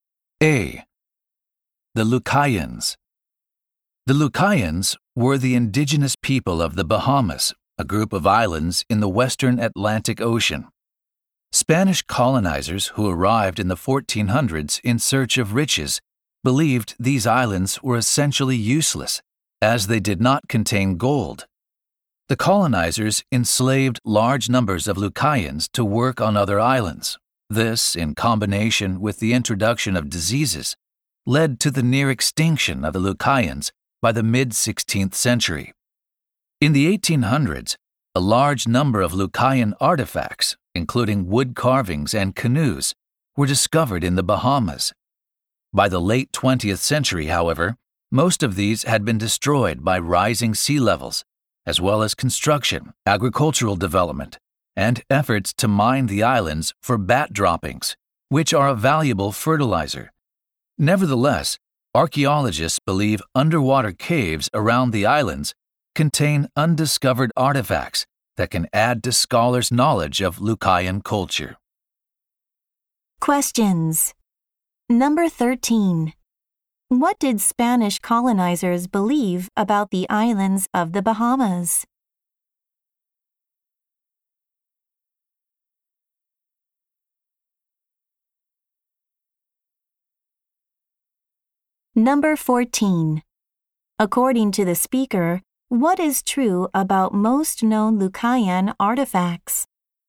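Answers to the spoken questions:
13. They were essentially useless because they had no gold.
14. Most have been destroyed by rising sea levels and development.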